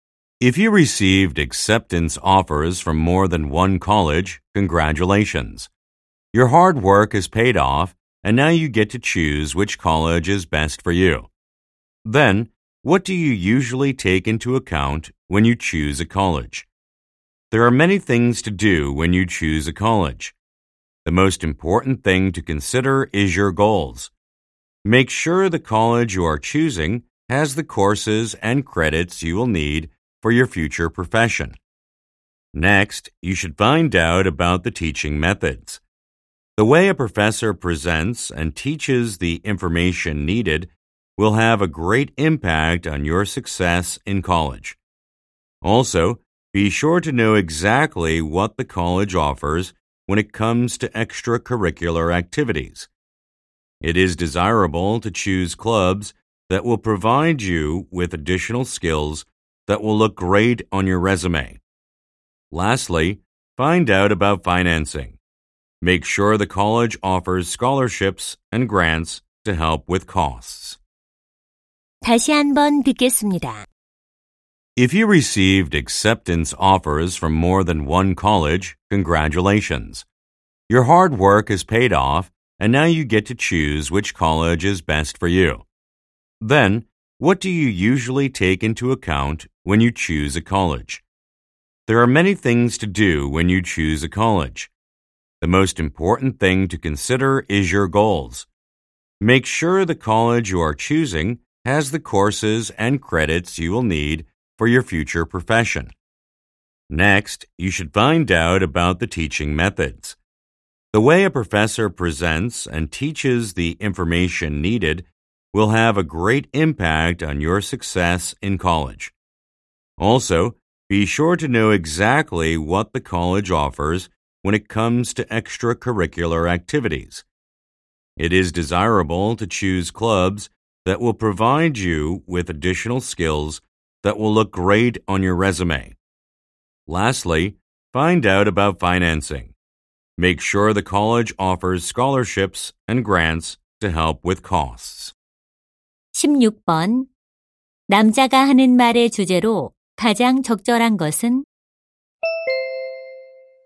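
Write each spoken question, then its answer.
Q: 남자가 하는 말의 주제로 가장 적절한 것은?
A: 대학을 선택할 때 고려해야 할 사항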